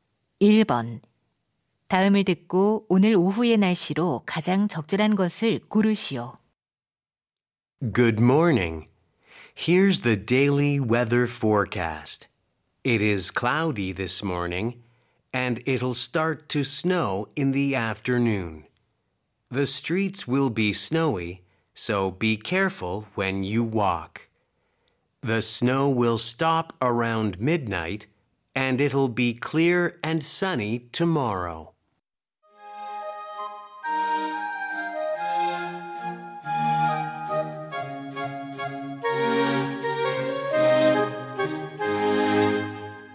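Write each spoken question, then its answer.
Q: 다음을 듣고 오늘 오후의 날씨로 가장 적절한 것을 고르시오.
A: 눈이 온다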